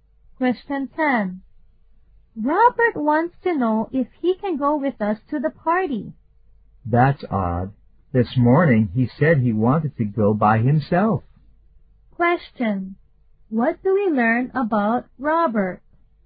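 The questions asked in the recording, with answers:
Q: What do we learn about Robert?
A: He has changed his mind.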